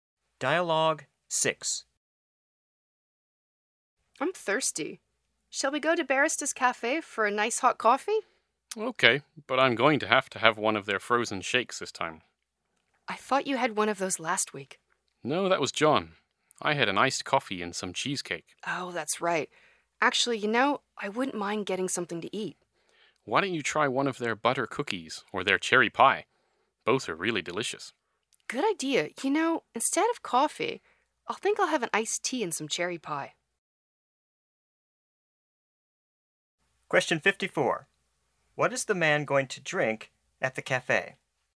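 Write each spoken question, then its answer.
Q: What is the man going to drink at the cafe?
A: Iced tea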